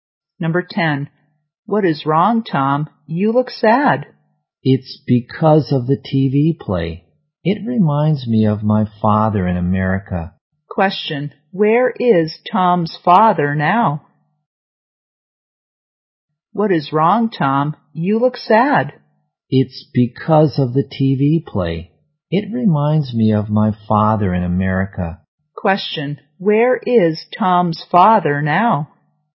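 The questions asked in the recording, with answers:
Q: where is Tom's father now?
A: In America.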